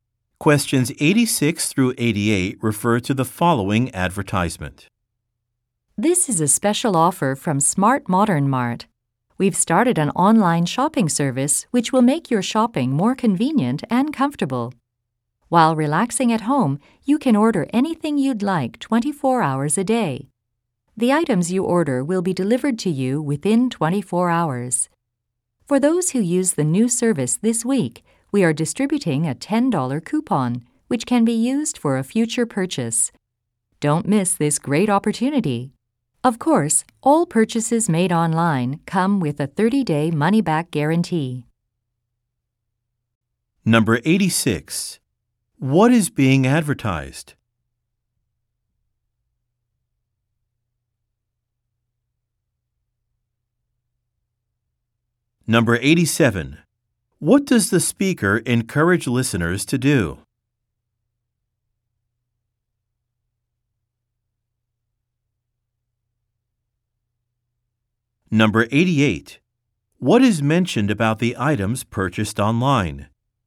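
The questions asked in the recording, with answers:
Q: What is being advertised?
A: An online shopping service

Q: What does the speaker encourage listeners to do?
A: Use the new service this week to get a $10 coupon

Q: What is mentioned about the items purchased online?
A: They come with a 30-day money-back guarantee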